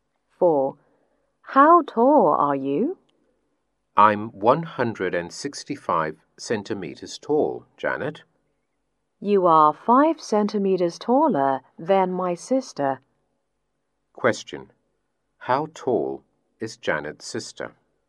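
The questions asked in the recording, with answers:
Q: How tall is Janet's sister?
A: 160 centimeters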